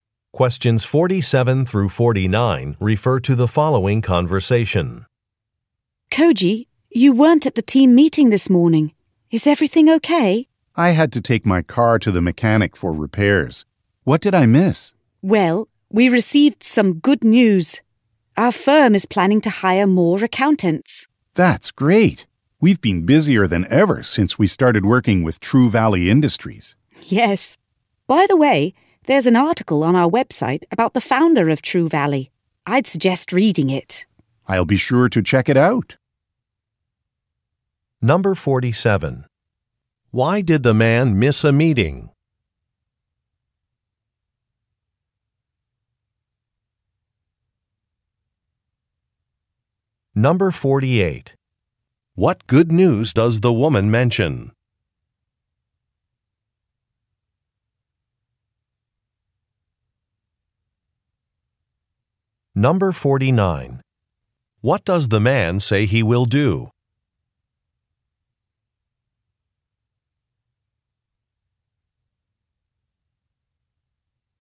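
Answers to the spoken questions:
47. He had to take his car to the mechanic for repairs.
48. The firm is planning to hire more accountants.
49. Read an article on the company website about True Valley's founder.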